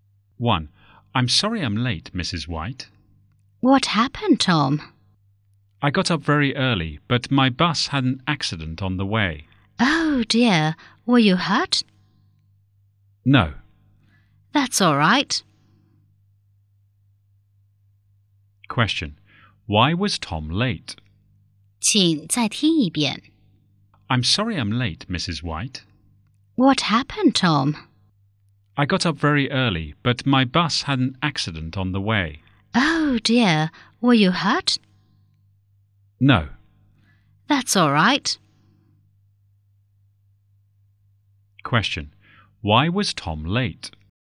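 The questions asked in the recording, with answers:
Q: Why was Tom late?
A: His bus had an accident on the way.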